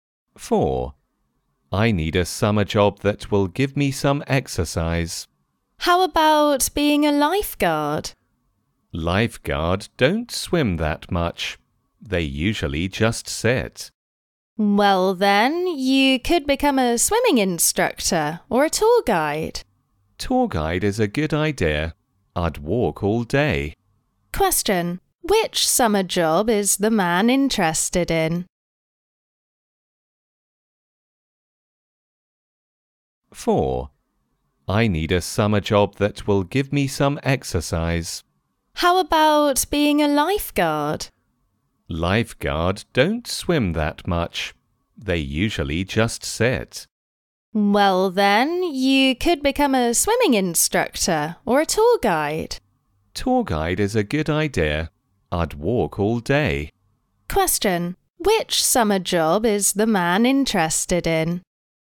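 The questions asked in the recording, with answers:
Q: Which summer job is the man interested in?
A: Tour guide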